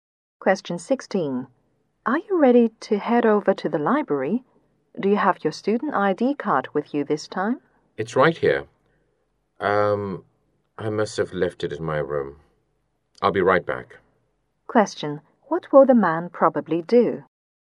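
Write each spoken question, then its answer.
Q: What will the man probably do?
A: Go back to his room to get his student ID card.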